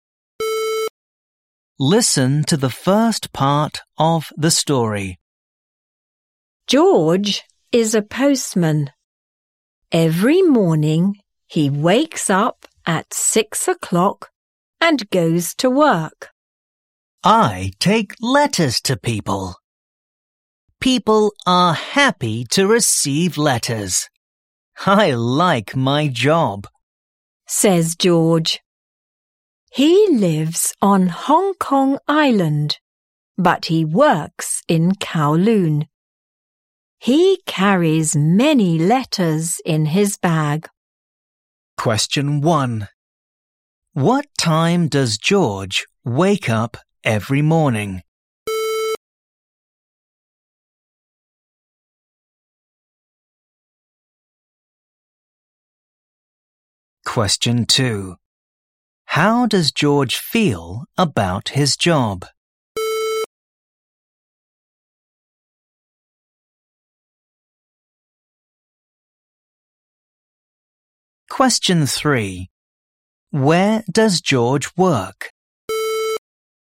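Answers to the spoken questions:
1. 6 o'clock
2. He likes it
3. Kowloon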